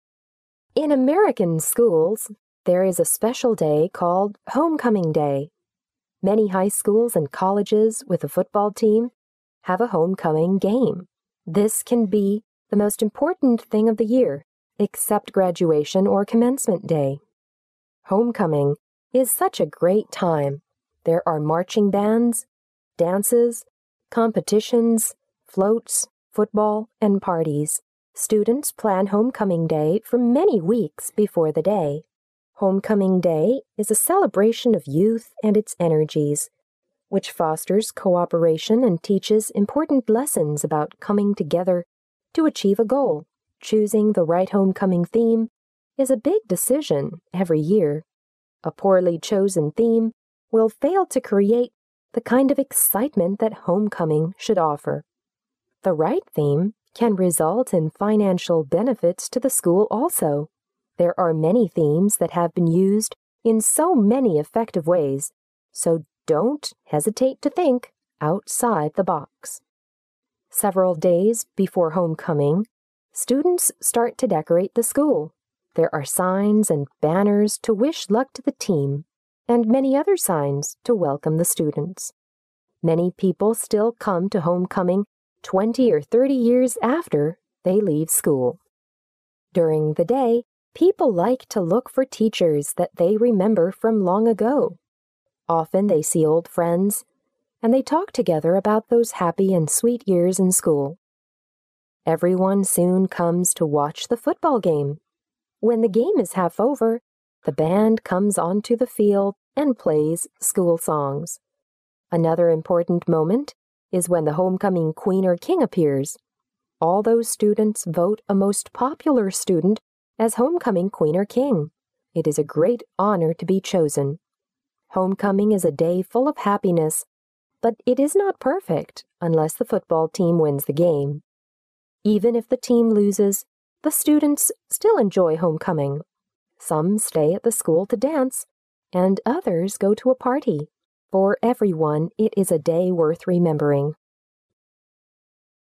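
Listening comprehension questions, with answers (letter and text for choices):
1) What is the main topic of the talk?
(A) How to do the decoration for a Homecoming Day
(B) How to choose a theme for a Homecoming Day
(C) What a Homecoming Day is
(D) When a Homecoming Day was invented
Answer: (C) What a Homecoming Day is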